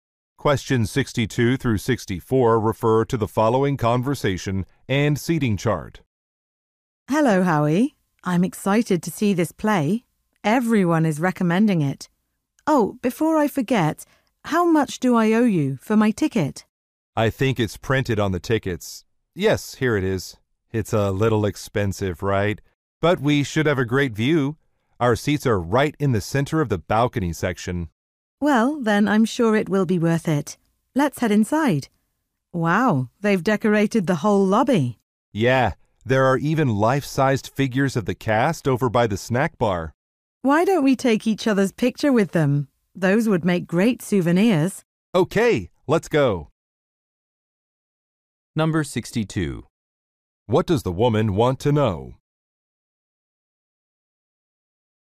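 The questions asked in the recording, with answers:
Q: What does the woman want to know?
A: How much her ticket cost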